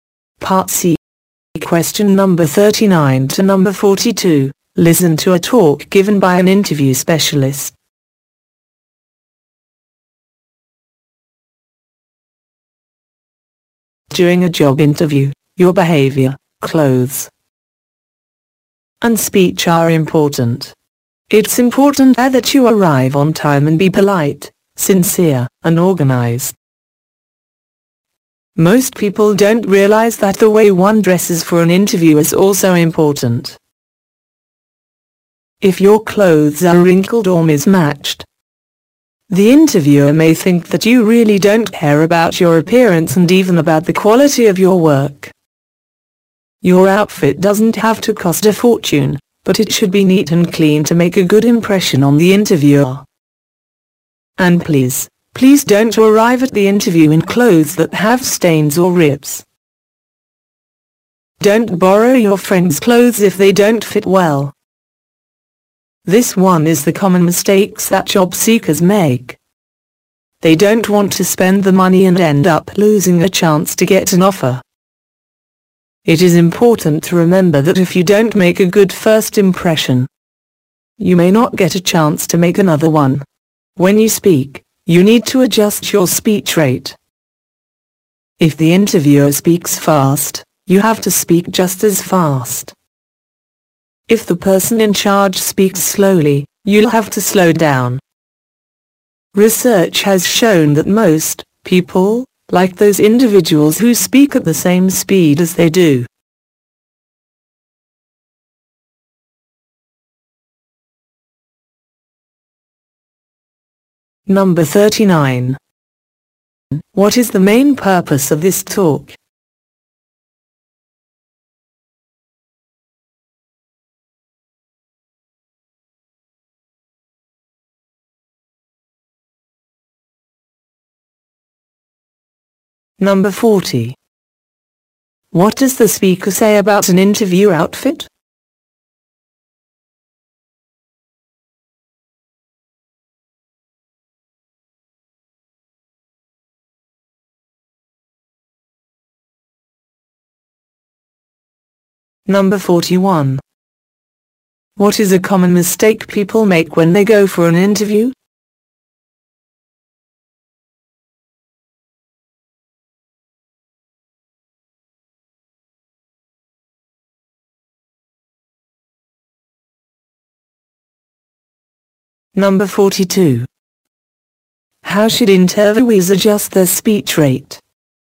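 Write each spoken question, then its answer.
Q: What is the main purpose of this talk?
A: To give advice on how to behave, dress and speak in a job interview.

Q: What does the speaker say about an interview outfit?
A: It need not be expensive but should be neat and clean.

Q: What is a common mistake people make when they go for an interview?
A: Borrowing friends' clothes that don't fit well.

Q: How should interviewees adjust their speech rate?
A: Match the interviewer's speed.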